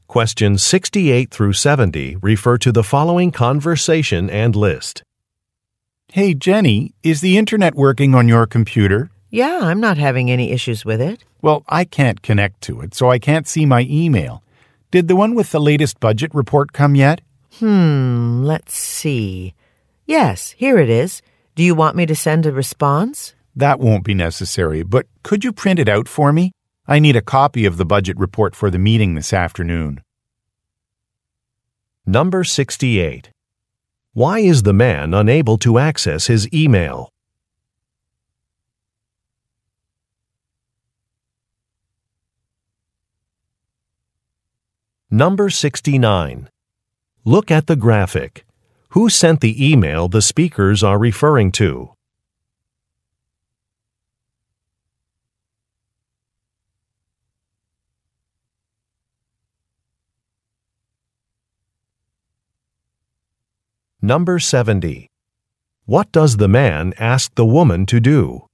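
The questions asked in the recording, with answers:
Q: Why is the man unable to access his email?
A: He can't connect to the internet.

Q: What does the man ask the woman to do?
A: Print out the email with the budget report.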